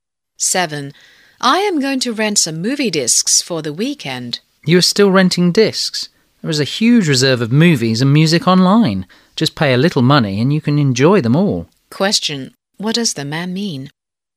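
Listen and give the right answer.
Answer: Renting discs is outdated; movies can be enjoyed online cheaply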